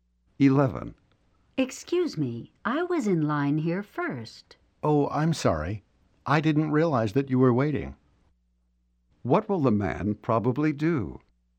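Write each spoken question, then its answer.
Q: What will the man probably do?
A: Let the woman go ahead of him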